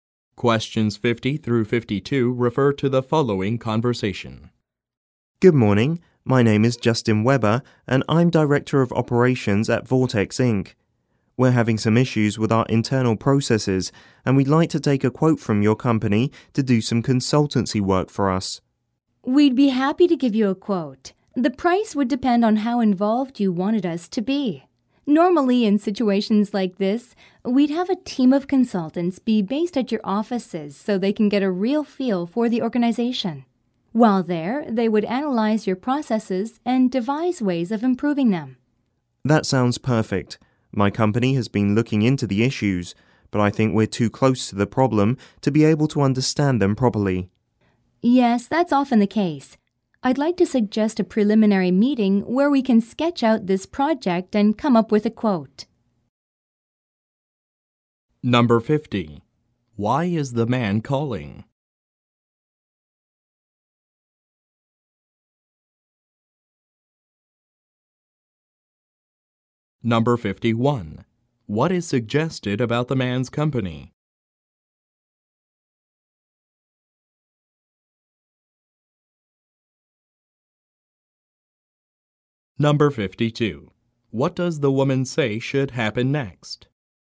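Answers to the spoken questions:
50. To get a quote for consultancy work
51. It has problems with its internal processes that it can't properly understand itself
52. A preliminary meeting to plan the project and come up with a quote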